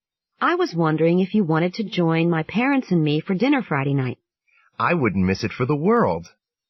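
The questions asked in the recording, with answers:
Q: What does the man imply?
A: He will definitely join them for dinner.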